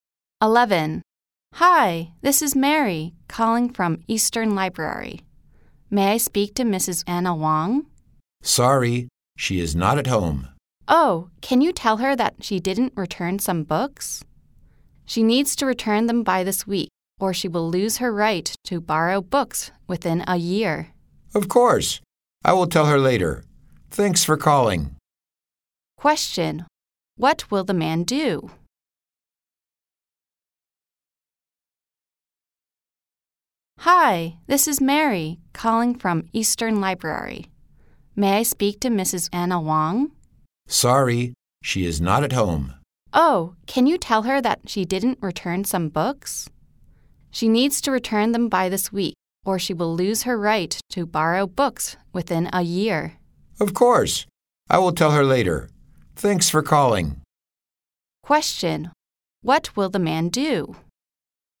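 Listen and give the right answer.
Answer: Tell Mrs. Anna Wong to return the books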